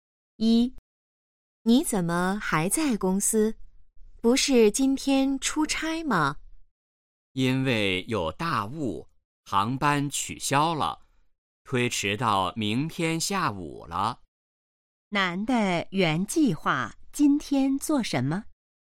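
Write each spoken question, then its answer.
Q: 男的原计划今天做什么?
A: 出差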